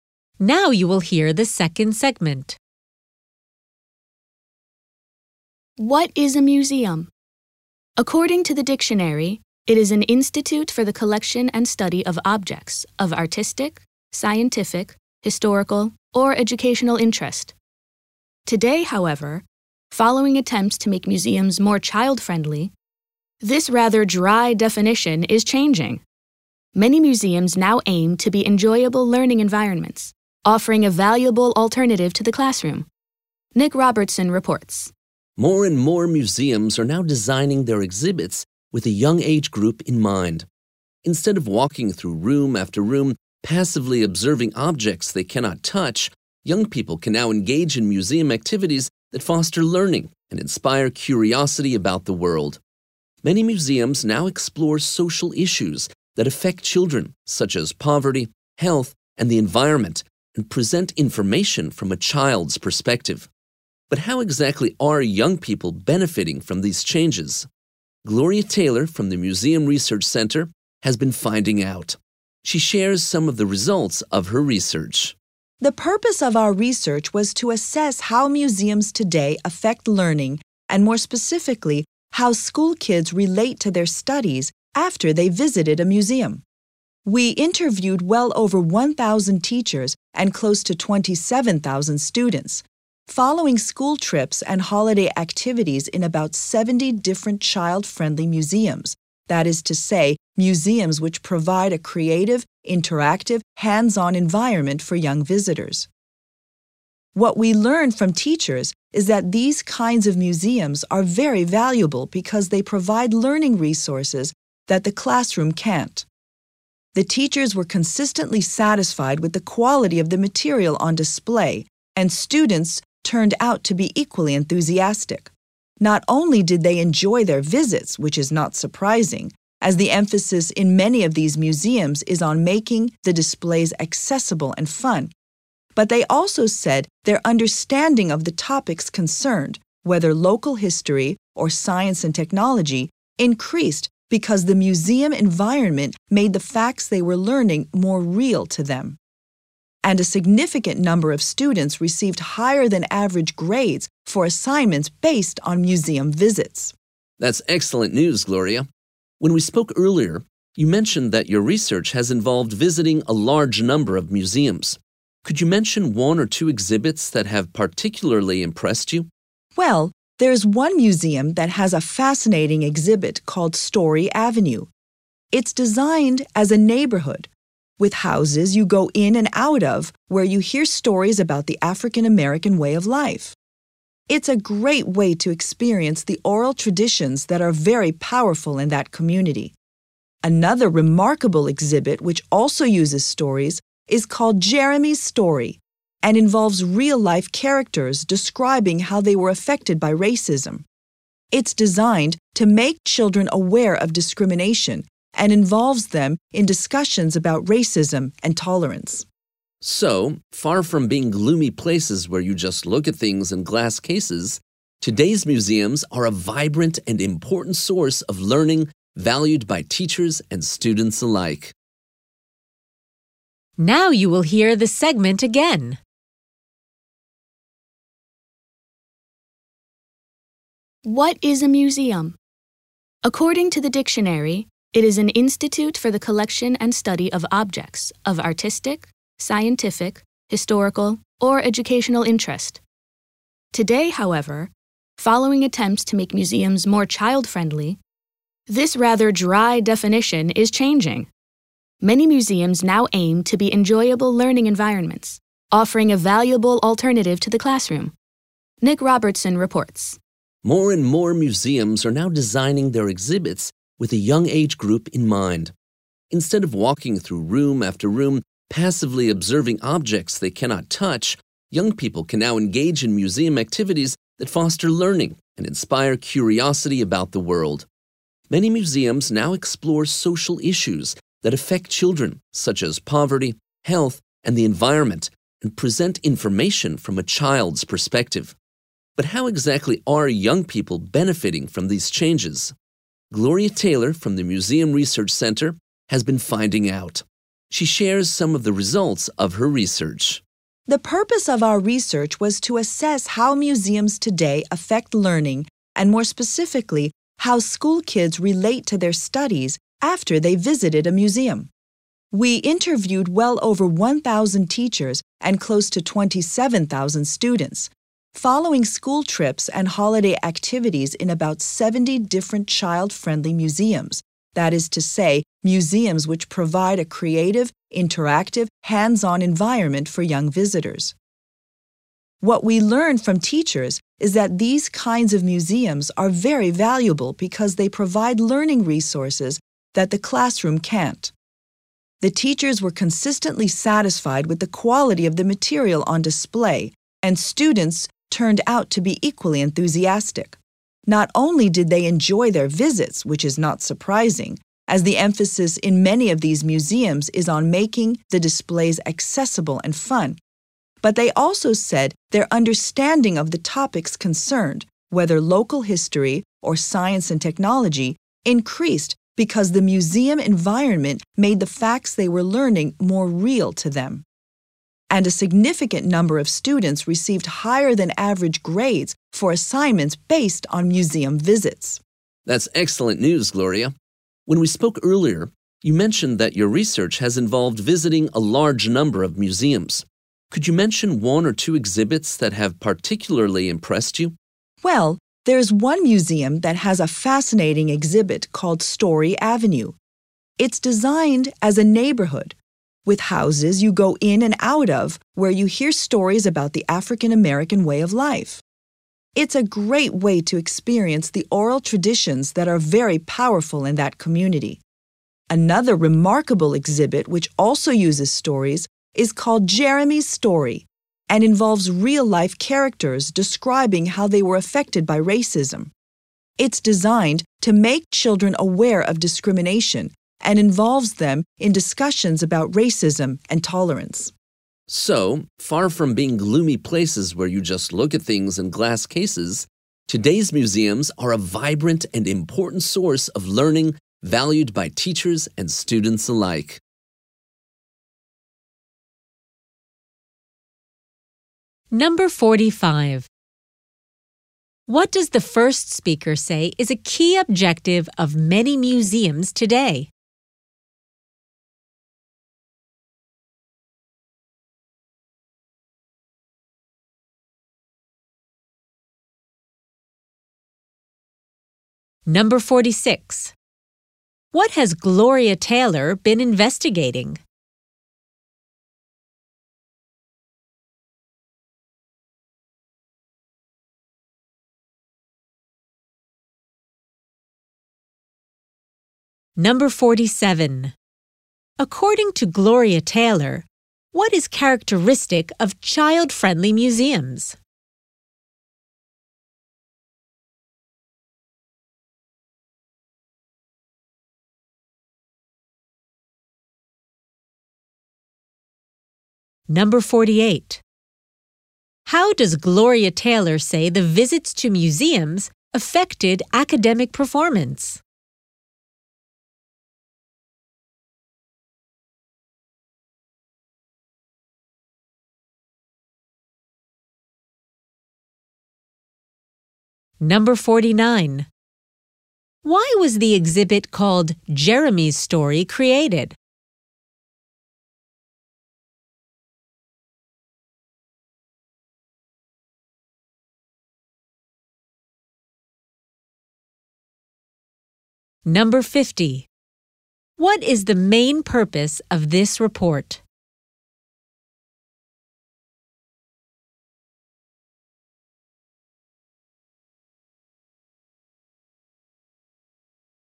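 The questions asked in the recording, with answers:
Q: What does the first speaker say is a key objective of many museums today?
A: To be enjoyable learning environments, an alternative to the classroom

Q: What has Gloria Taylor been investigating?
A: How museums affect learning and how students relate to their studies after visits

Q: According to Gloria Taylor, what is characteristic of child-friendly museums?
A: A creative, interactive, hands-on environment

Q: How does Gloria Taylor say the visits to museums affected academic performance?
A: Many students got higher than average grades on assignments based on museum visits

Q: Why was the exhibit called Jeremy's Story created?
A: To make children aware of discrimination and discuss racism and tolerance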